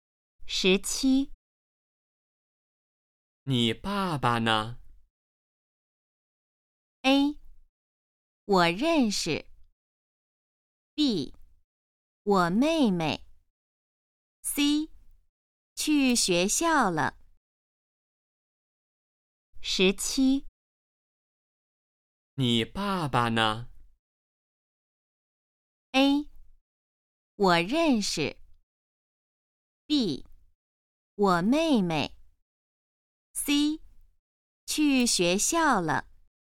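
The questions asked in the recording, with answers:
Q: 你爸爸呢?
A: C: 去学校了。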